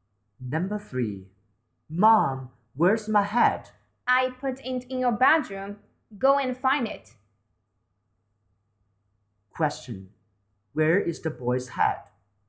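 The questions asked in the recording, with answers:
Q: Where is the boy's hat?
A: In his bedroom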